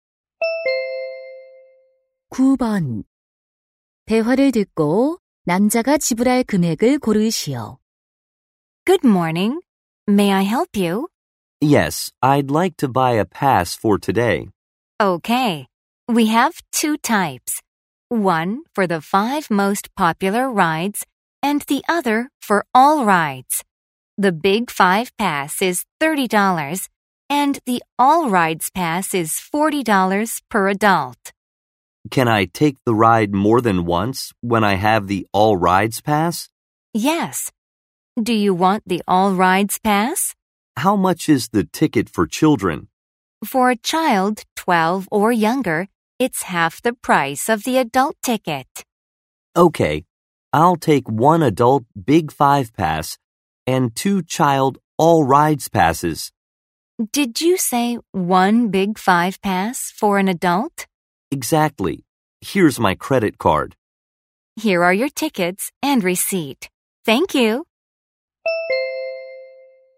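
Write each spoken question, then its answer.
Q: 대화를 듣고 남자가 지불할 금액을 고르시오.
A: 70달러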